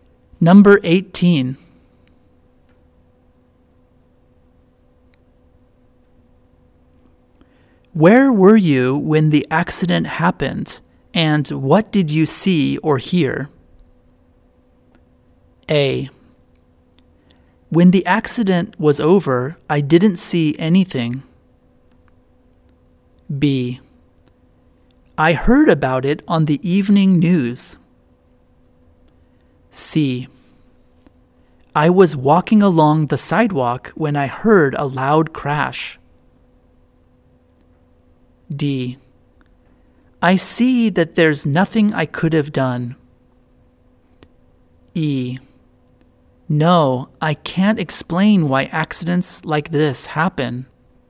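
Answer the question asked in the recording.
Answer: C: I was walking along the sidewalk when I heard a loud crash.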